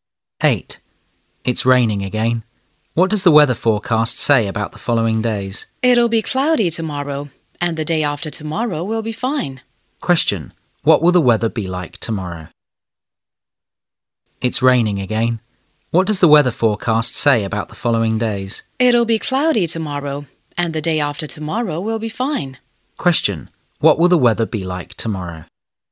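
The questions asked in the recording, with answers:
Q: What will the weather be like tomorrow?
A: Cloudy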